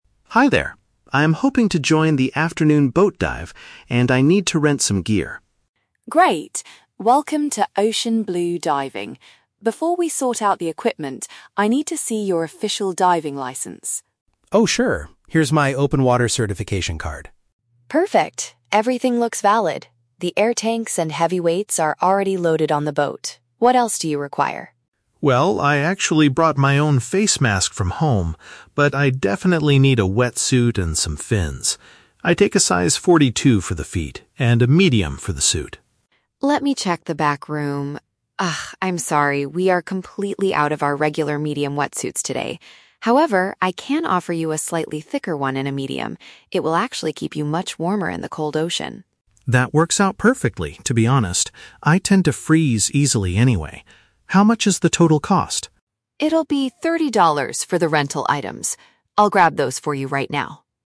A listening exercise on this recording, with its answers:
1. What must the customer do before discussing the equipment?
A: Prove that he is officially trained and allowed to dive.

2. Which piece of equipment does the customer ALREADY have with him?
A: The gear used to see clearly underwater.

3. Why does the staff member offer a different type of wetsuit?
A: Because the standard version in his size is no longer available.

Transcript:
Customer: Hi there. I'm hoping to join the afternoon boat dive, and I need to rent some gear.
Staff: Great! Welcome to Ocean Blue Diving. Before we sort out the equipment, I need to see your official diving license.
Customer: Oh, sure. Here's my open water certification card.
Staff: Perfect, everything looks valid. The air tanks and heavy weights are already loaded on the boat. What else do you require?
Customer: Well, I actually brought my own face mask from home, but I definitely need a wetsuit and some fins. I take a size 42 for the feet, and a medium for the suit.
Staff: Let me check the back room... Ah, I'm sorry, we are completely out of our regular medium wetsuits today. However, I can offer you a slightly thicker one in a medium. It will actually keep you much warmer in the cold ocean.
Customer: That works out perfectly, to be honest. I tend to freeze easily anyway. How much is the total cost?
Staff: It'll be thirty dollars for the rental items. I'll grab those for you right now.